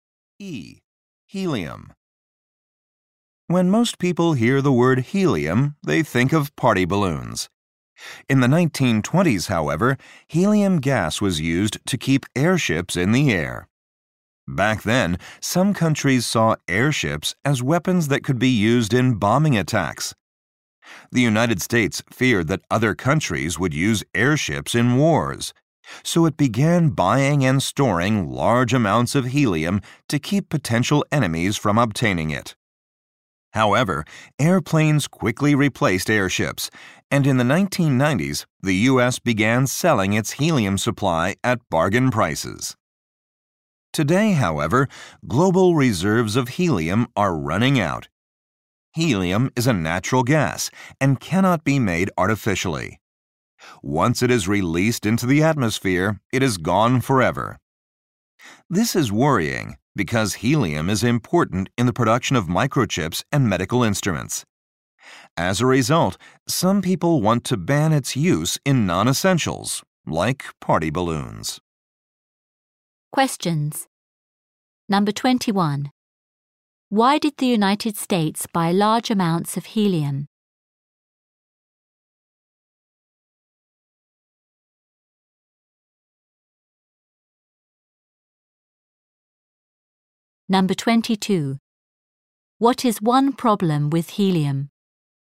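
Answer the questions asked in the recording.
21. To keep potential enemies from getting it for airships.
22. Global reserves are running out, and it cannot be made artificially.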